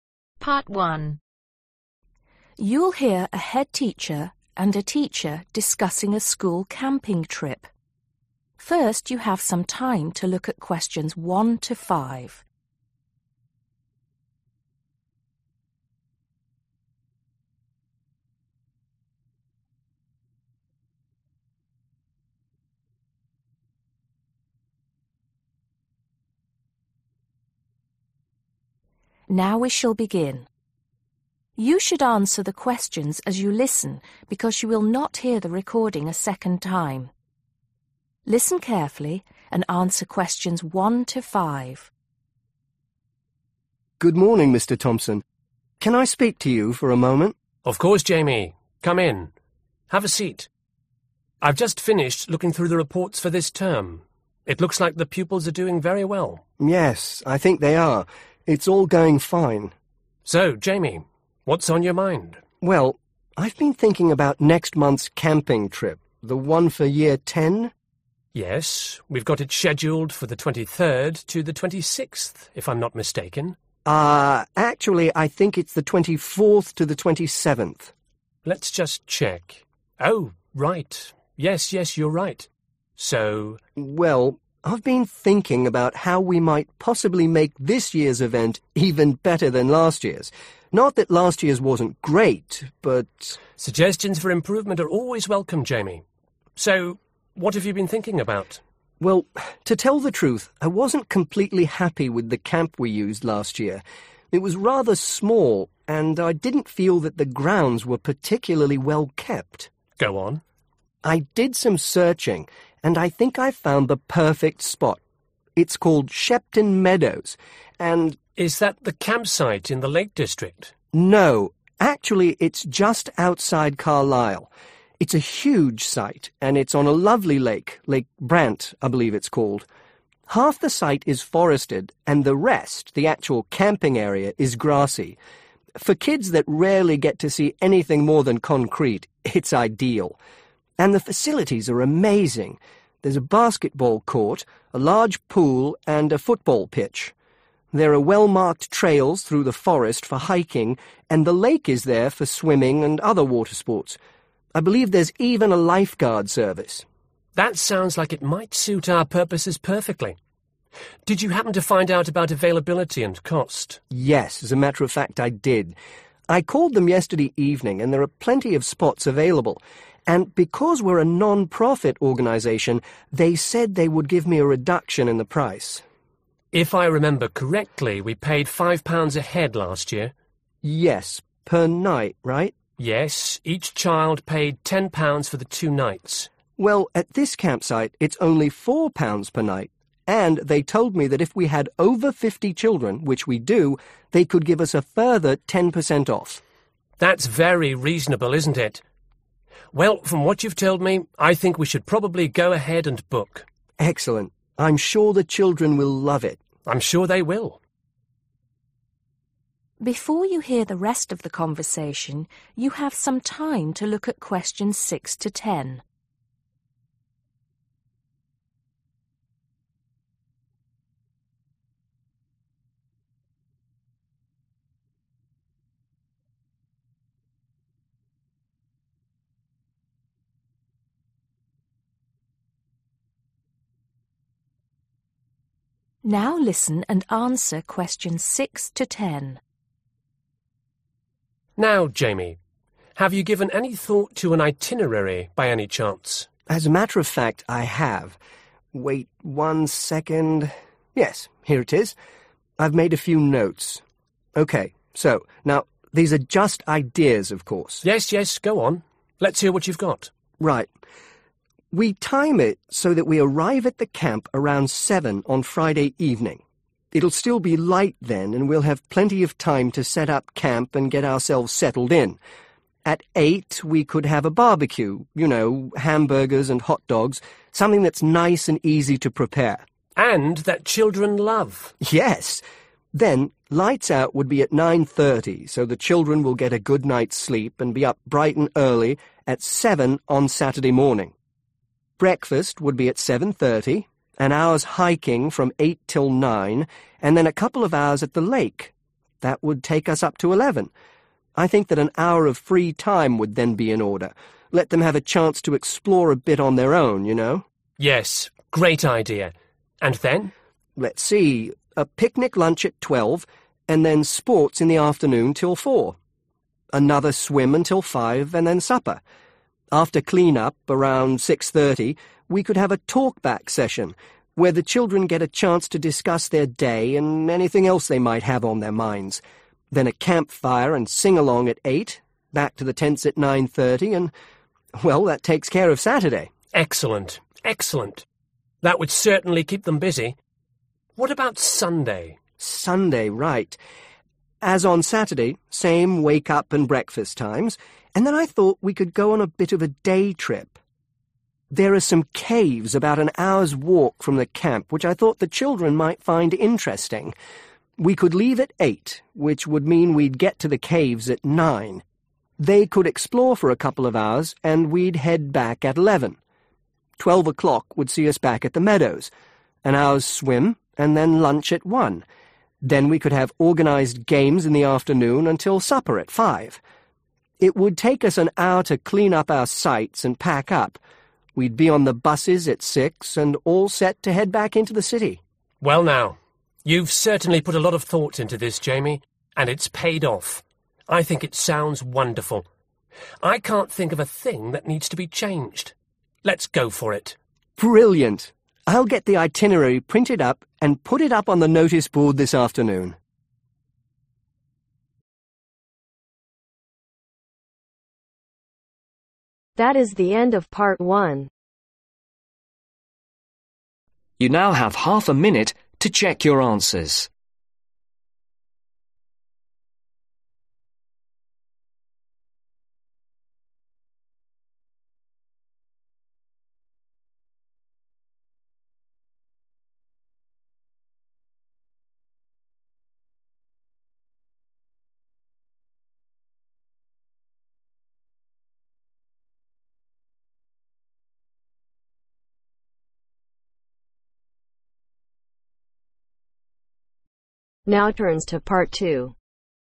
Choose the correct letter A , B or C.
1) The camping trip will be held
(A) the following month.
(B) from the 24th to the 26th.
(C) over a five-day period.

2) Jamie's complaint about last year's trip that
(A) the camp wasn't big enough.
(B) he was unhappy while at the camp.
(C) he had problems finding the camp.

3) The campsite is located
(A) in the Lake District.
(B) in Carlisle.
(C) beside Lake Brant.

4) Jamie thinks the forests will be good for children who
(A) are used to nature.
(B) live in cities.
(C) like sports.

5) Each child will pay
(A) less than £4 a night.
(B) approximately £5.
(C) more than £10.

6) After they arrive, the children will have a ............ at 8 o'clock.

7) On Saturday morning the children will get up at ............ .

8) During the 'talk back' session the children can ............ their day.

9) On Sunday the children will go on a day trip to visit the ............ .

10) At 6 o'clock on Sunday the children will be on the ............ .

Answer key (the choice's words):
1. the following month.
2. the camp wasn't big enough.
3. beside Lake Brant.
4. live in cities.
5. less than £4 a night.
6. Barbecue
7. Seven
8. Discuss
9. Caves
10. Buses